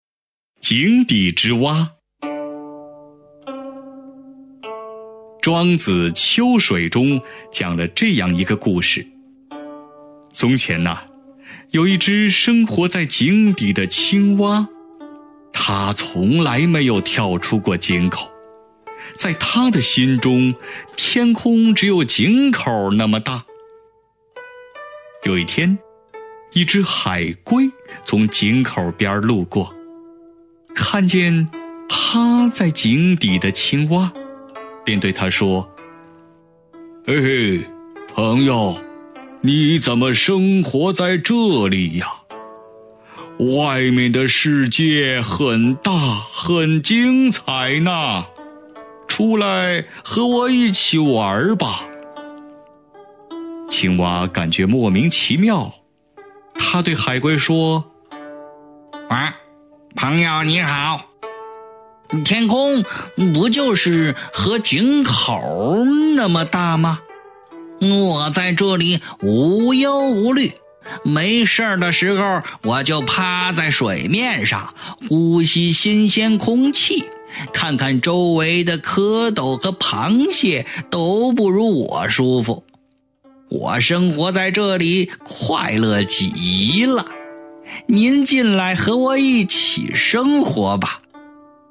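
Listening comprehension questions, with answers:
★音声を聞き、空欄〇に当てはまる単語を探して、授業内課題用紙に漢字とピンインを書いてください。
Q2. 《庄子・秋水》中讲了这样一个〇〇。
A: 故事

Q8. 嘿嘿,〇〇,你怎么生活在这里呀?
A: 朋友

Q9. 外面的〇〇很大,很精彩呢。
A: 世界

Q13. 〇〇,你好。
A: 朋友

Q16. 没事儿的〇〇,我就趴在水面上,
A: 时候

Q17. 呼吸〇〇空气。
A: 新鲜

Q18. 看看周围的蝌蚪和螃蟹都不如我〇〇。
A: 舒服

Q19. 我生活在这里〇〇极了。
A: 快乐

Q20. 您进来和我〇〇生活吧。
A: 一起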